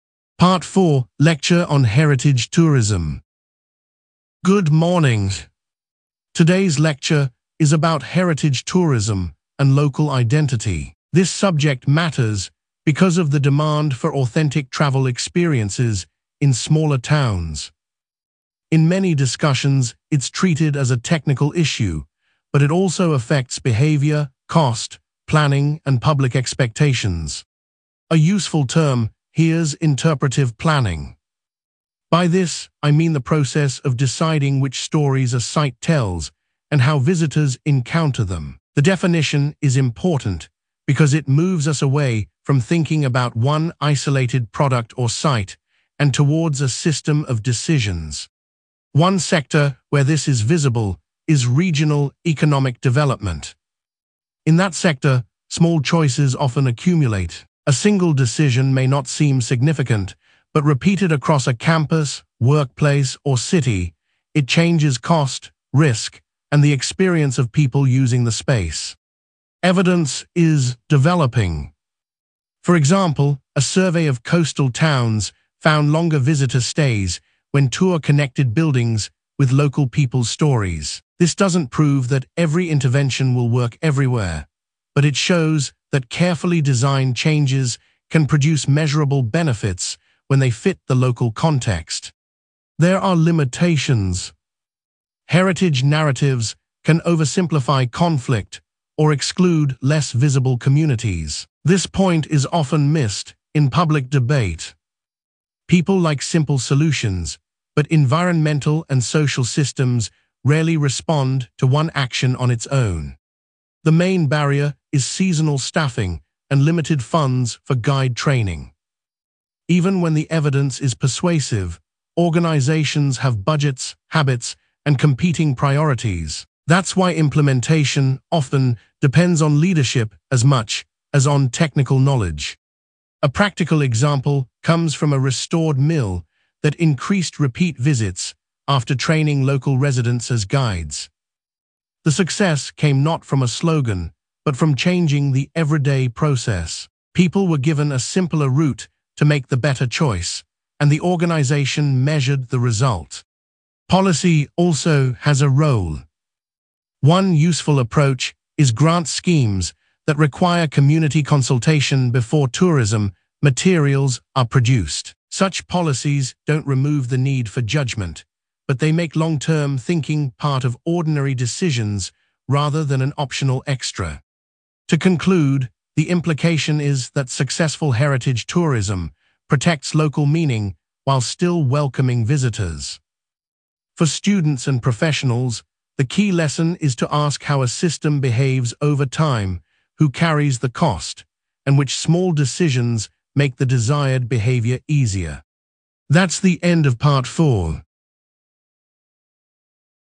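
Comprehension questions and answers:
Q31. What is the main topic of the lecture?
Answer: heritage tourism and local identity

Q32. What primary cause or pressure does the lecturer mention?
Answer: the demand for authentic travel experiences in smaller towns

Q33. Which sector is used as an example?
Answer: regional economic development

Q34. What does the term interpretive planning mean?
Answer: the process of deciding which stories a site tells and how visitors encounter them

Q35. What did the study or survey find?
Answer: a survey of coastal towns found longer visitor stays when tours connected buildings with local people's stories

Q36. What limitation does the lecturer mention?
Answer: heritage narratives can oversimplify conflict or exclude less visible communities

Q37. What is identified as the main barrier?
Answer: seasonal staffing and limited funds for guide training

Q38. What practical example does the lecturer give?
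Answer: a restored mill that increased repeat visits after training local residents as guides

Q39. What policy approach is mentioned?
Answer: grant schemes that require community consultation before tourism materials are produced

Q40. What is the overall implication?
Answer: successful heritage tourism protects local meaning while still welcoming visitors

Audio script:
Part 4: Lecture on Heritage Tourism
Lecturer: Good morning. Today's lecture is about heritage tourism and local identity. This subject matters because of the demand for authentic travel experiences in smaller towns. In many discussions it is treated as a technical issue, but it also affects behaviour, cost, planning, and public expectations.
Lecturer: A useful term here is interpretive planning. By this I mean the process of deciding which stories a site tells and how visitors encounter them. The definition is important because it moves us away from thinking about one isolated product or site and towards a system of decisions.
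Lecturer: One sector where this is visible is regional economic development. In that sector, small choices often accumulate. A single decision may not seem significant, but repeated across a campus, workplace, or city, it changes cost, risk, and the experience of people using the space.
Lecturer: Evidence is developing. For example, a survey of coastal towns found longer visitor stays when tours connected buildings with local people's stories. This does not prove that every intervention will work everywhere, but it shows that carefully designed changes can produce measurable benefits when they fit the local context.
Lecturer: There are limitations. This point is often missed in public debate. People like simple solutions, but environmental and social systems rarely respond to one action on its own.
Lecturer: The main barrier is seasonal staffing and limited funds for guide training. Even when the evidence is persuasive, organisations have budgets, habits, and competing priorities. 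That is why implementation often depends on leadership as much as on technical knowledge.
Lecturer: A practical example comes from a restored mill that increased repeat visits after training local residents as guides. The success came not from a slogan, but from changing the everyday process. People were given a simpler route to make the better choice, and the organisation measured the result.
Lecturer: Policy also has a role. One useful approach is grant schemes that require community consultation before tourism materials are produced. Such policies do not remove the need for judgement, but they make long-term thinking part of ordinary decisions rather than an optional extra.
Lecturer: To conclude, the implication is that successful heritage tourism protects local meaning while still welcoming visitors. For students and professionals, the key lesson is to ask how a system behaves over time, who carries the cost, and which small decisions make the desired behaviour easier.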